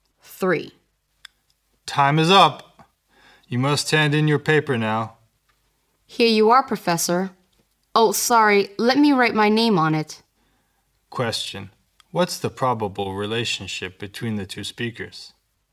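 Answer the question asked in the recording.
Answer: Teacher (professor) and student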